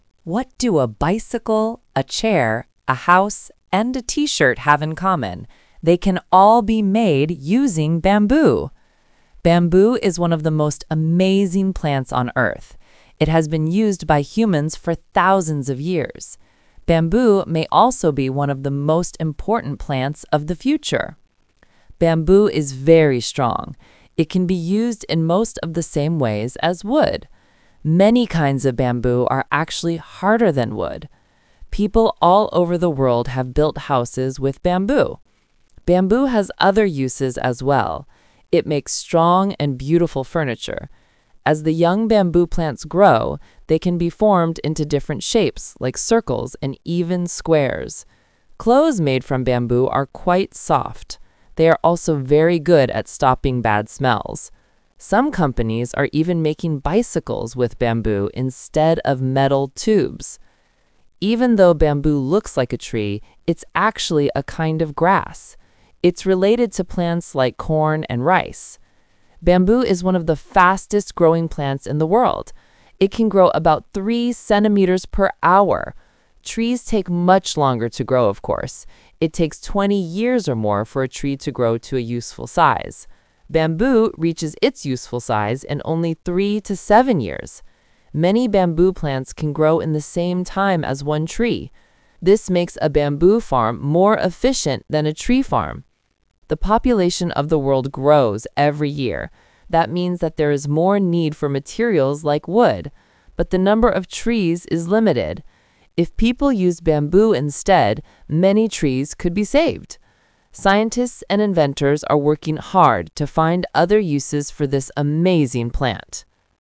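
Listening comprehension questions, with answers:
Talk/Lecture 2: Listen to a woman talking about bamboo.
Which of the following is NOT mentioned as a use for bamboo?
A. Building houses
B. Making clothes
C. Making cars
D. Making bicycles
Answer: Making cars

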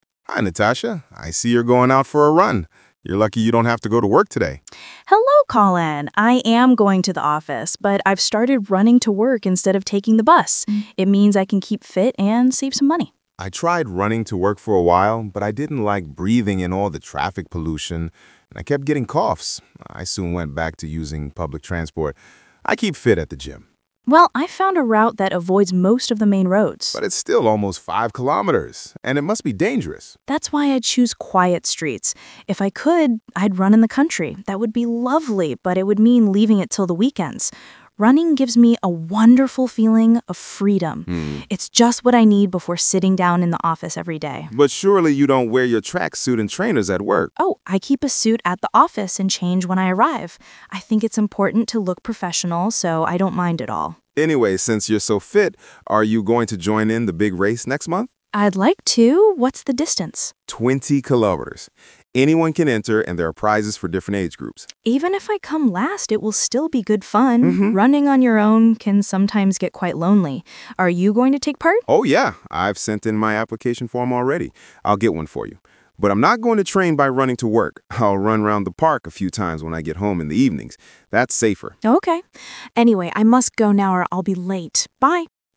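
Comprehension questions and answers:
Conversation 1: You will hear two neighbours, Natasha and Colin, talking about running.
What does Natasha wear at work?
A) a tracksuit and trainers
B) a shirt and trousers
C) a suit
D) casual clothes.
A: a suit

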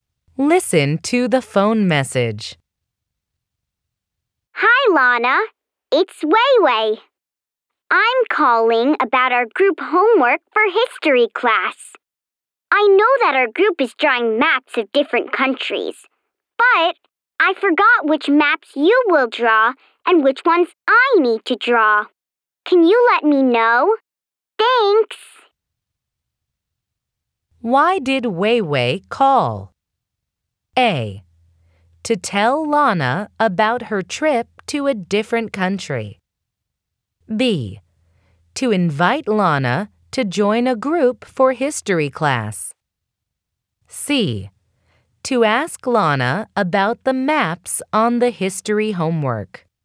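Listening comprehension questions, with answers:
Why did Wei-Wei call?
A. To tell Lana about her trip to a different country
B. To invite Lana to join a group for history class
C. To ask Lana about the maps on the history homework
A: To ask Lana about the maps on the history homework

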